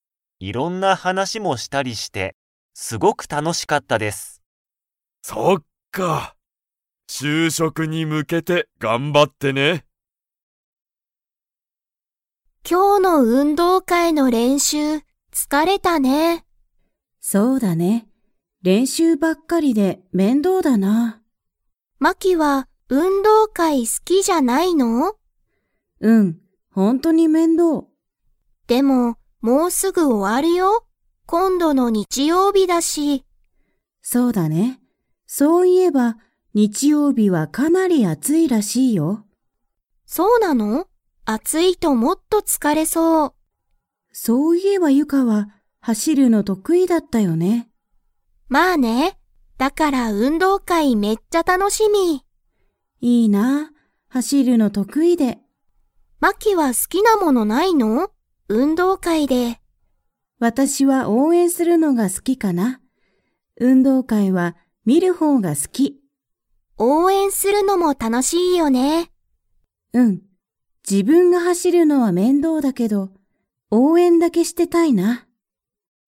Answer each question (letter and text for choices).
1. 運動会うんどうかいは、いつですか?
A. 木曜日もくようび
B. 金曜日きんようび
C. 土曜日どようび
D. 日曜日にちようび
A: D. 日曜日にちようび

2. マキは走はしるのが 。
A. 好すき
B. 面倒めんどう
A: B. 面倒めんどう

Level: Level 4